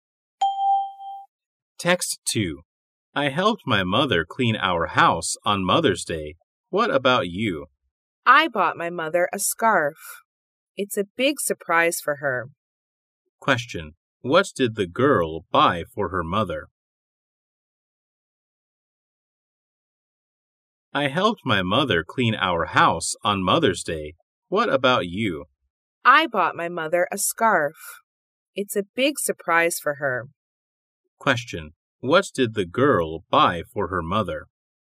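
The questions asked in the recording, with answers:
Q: What did the girl buy for her mother?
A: A scarf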